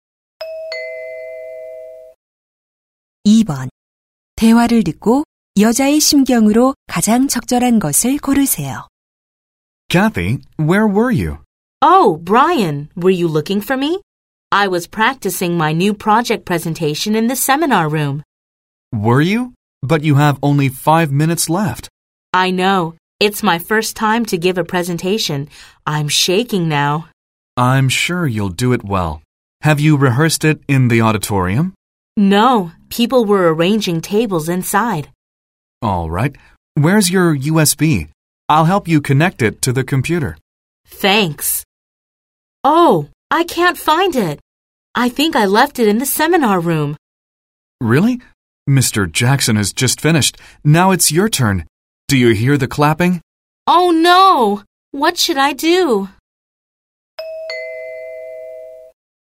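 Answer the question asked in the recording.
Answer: 초조하고 당황함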